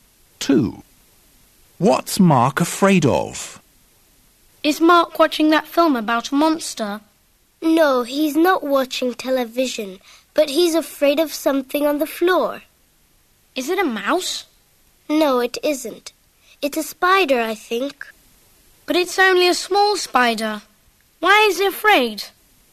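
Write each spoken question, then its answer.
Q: What's Mark afraid of?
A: a spider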